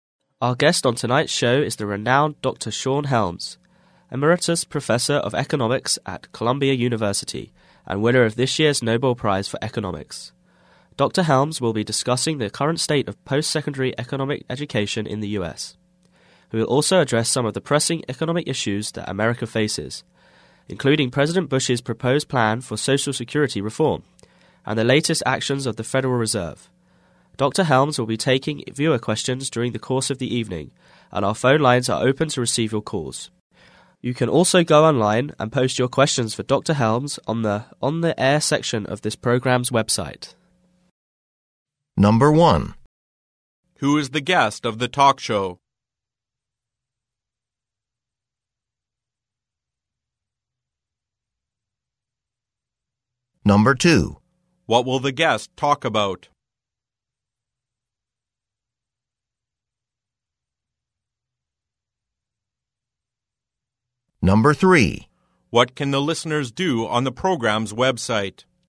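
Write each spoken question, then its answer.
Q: Who is the guest of the talk show?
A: Dr. Sean Helms, an economics professor and Nobel Prize winner

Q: What will the guest talk about?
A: Post-secondary economic education in the US and pressing economic issues such as Social Security reform and the Federal Reserve

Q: What can the listeners do on the program's website?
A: Post questions for Dr. Helms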